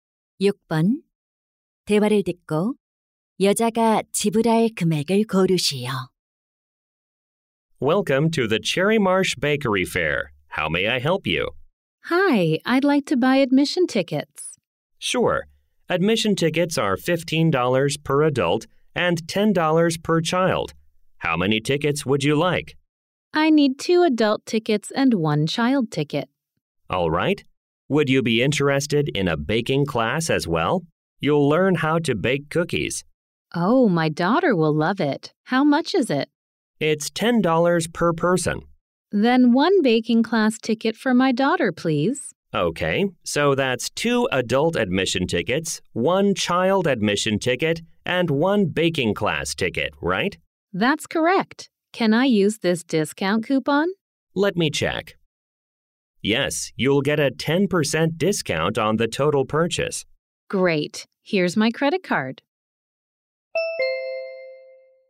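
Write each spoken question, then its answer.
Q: 대화를 듣고 여자가 지불할 금액을 고르시오.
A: 45달러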